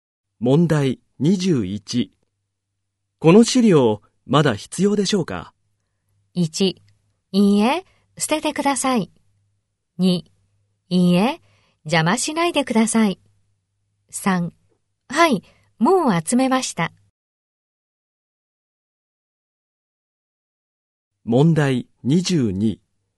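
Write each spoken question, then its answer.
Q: この資料まだ必要でしょうか?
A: 1: いいえ、捨ててください。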